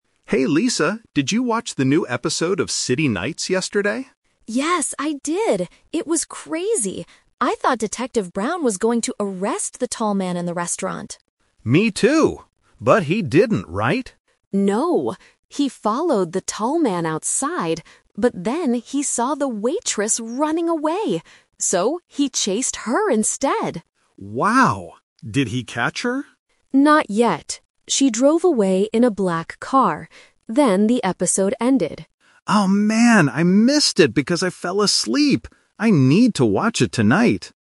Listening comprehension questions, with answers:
Listen to the conversation and choose the correct answer (A, B, or C) for each question.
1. Who did Detective Brown chase in the end?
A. The tall man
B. The waitress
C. Another police officer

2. How did the woman escape?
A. She took a taxi.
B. She ran into the restaurant.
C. She drove a black car.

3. Why didn't Mark watch the episode yesterday?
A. He fell asleep.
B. He was working late.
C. He was at a restaurant.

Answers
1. B. The waitress
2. C. She drove a black car.
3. A. He fell asleep.

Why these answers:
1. Lisa says Detective Brown followed the tall man first (Option A is the trap), "but" then he saw the waitress and chased her instead. Option C is not mentioned.
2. Lisa clearly states that the waitress "drove away in a black car." Option B is the trap because the "restaurant" is mentioned earlier in the story as the place where the tall man was. Option A is not mentioned.
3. At the end of the conversation, Mark says, "I missed it because I fell asleep." Option C is the trap because a restaurant was mentioned in the TV show, not in Mark's real life. Option B is not mentioned.

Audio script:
Mark: Hey Lisa, did you watch the new episode of City Nights yesterday?
Lisa: Yes, I did! It was crazy. I thought Detective Brown was going to arrest the tall man in the restaurant.
Mark: Me too! But he didn't, right?
Lisa: No. He followed the tall man outside, but then he saw the waitress running away. So, he chased her instead!
Mark: Wow. Did he catch her?
Lisa: Not yet. She drove away in a black car. Then the episode ended.
Mark: Oh man, I missed it because I fell asleep. I need to watch it tonight!

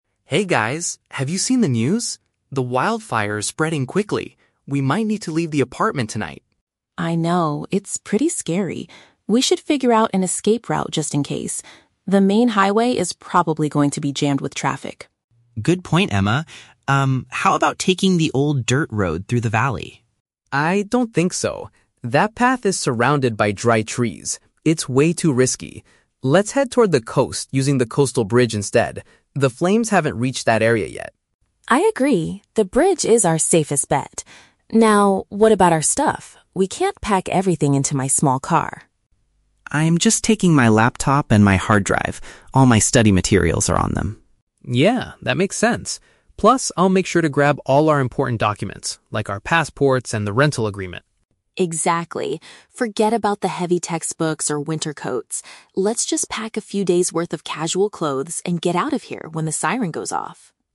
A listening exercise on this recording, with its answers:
Listen to a conversation between three college roommates and choose the correct answer (A, B, or C) for each question.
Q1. Which route do the students decide to take if they must evacuate?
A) The busy main highway.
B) A path through the valley.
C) The road along the ocean.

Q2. What is Liam planning to bring with him?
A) Electronic devices storing his coursework.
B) Official identity and housing papers.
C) Several heavy textbooks for his classes.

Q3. What does Emma suggest regarding their clothing?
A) They should bring thick jackets for the cold.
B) They should only take light outfits for a short period.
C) They should pack all their outfits into her large vehicle.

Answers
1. C) The road along the ocean.
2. A) Electronic devices storing his coursework.
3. B) They should only take light outfits for a short period.

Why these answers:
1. Ryan suggests that they "head toward the coast using the coastal bridge" and Emma agrees. "Coast" and "ocean" are synonyms.
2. Liam says he is taking his "laptop and my hard drive" because his "study materials are on them". "Electronic devices" is a paraphrase for laptop/hard drive.
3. Emma tells the guys to pack "a few days' worth of casual clothes". "Light outfits" is a paraphrase for "casual clothes", and "a few days' worth" means for a short period.

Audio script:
Ryan: Hey guys, have you seen the news? The wildfire is spreading quickly. We might need to leave the apartment tonight.
Emma: I know, it's pretty scary. We should figure out an escape route just in case. The main highway is probably going to be jammed with traffic.
Liam: Good point, Emma. Um, how about taking the old dirt road through the valley?
Ryan: I don't think so. That path is surrounded by dry trees. It's way too risky. Let's head toward the coast using the coastal bridge instead. The flames haven't reached that area yet.
Emma: I agree, the bridge is our safest bet. Now, what about our stuff? We can't pack everything into my small car.
Liam: I'm just taking my laptop and my hard drive. All my study materials are on them.
Ryan: Yeah, that makes sense. Plus, I'll make sure to grab all our important documents, like our passports and the rental agreement.
Emma: Exactly. Forget about the heavy textbooks or winter coats.

